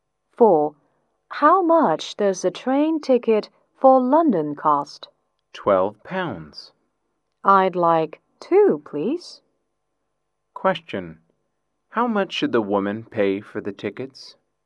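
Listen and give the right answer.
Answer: £24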